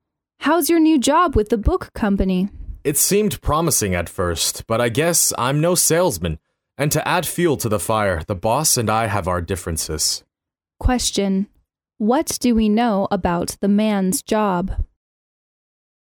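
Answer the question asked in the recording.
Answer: It isn't going well: he isn't good at selling and disagrees with his boss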